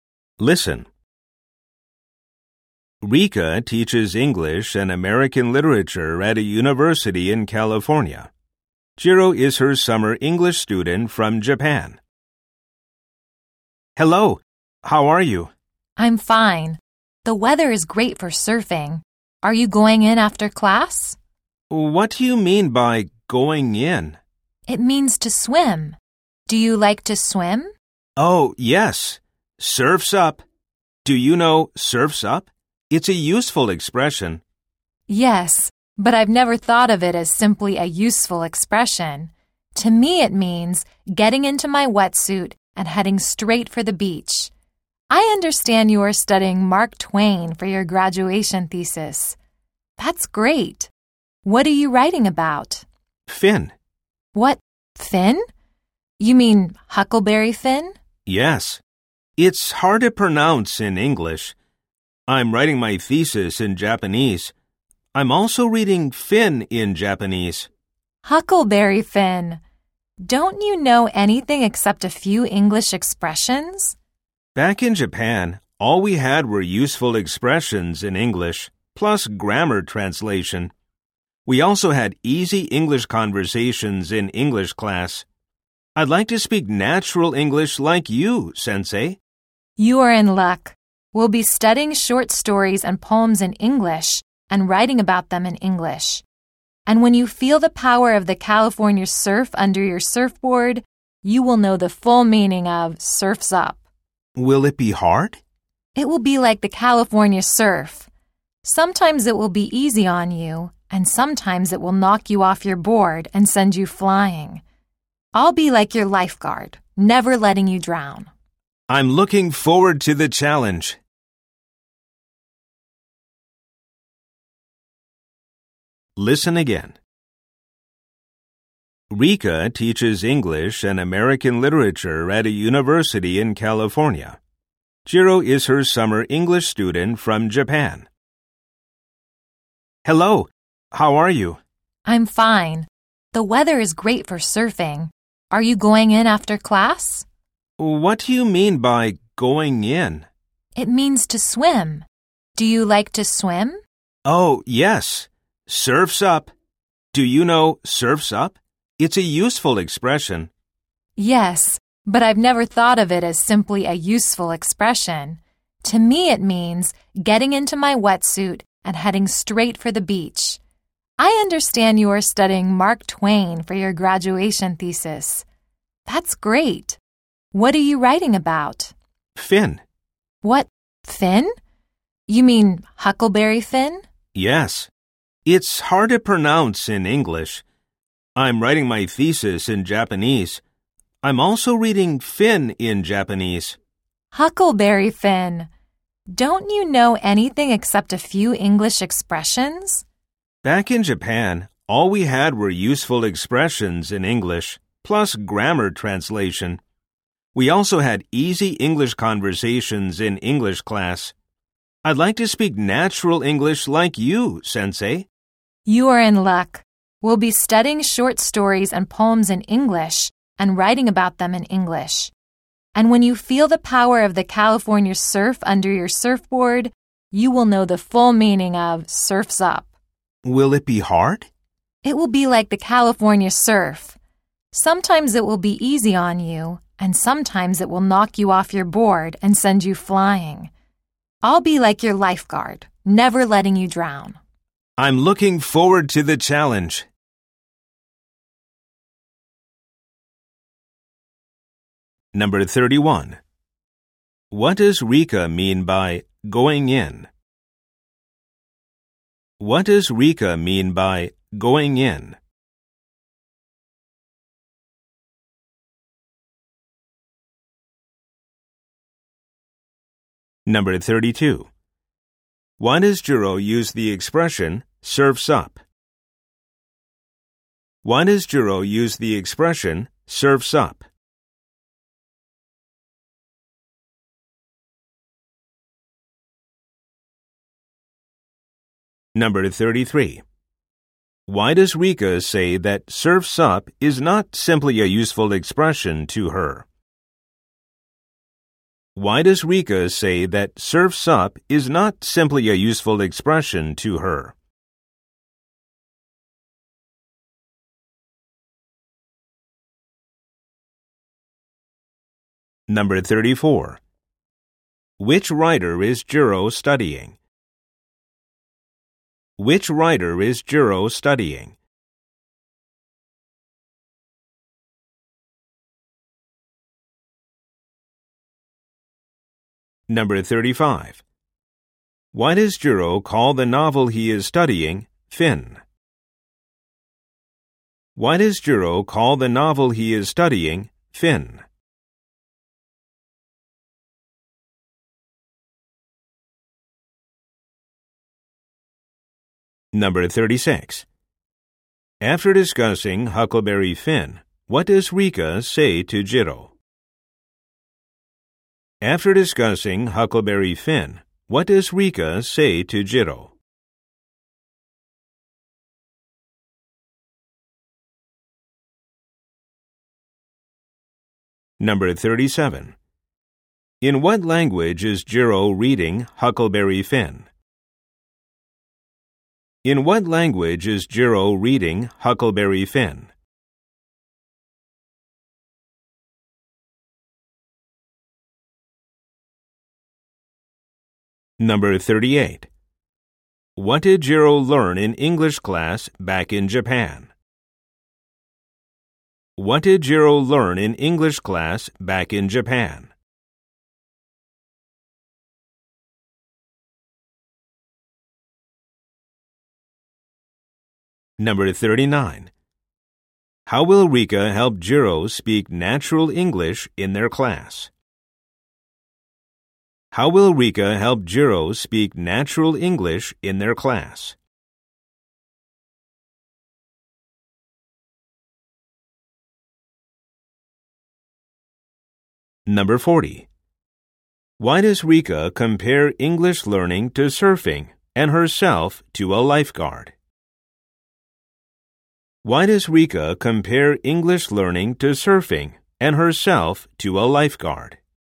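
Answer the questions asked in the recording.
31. To swim
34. Mark Twain
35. Huckleberry Finn is hard to pronounce in English
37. Japanese
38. Useful expressions, grammar translation and easy conversations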